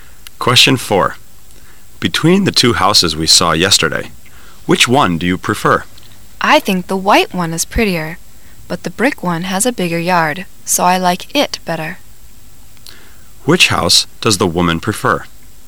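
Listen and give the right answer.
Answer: The brick one

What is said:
[解析] M: Between the two houses we saw yesterday, which one do you prefer? W: I think the white one is prettier, but the brick one has a bigger yard, so I like it better. Q: Which house does the woman prefer?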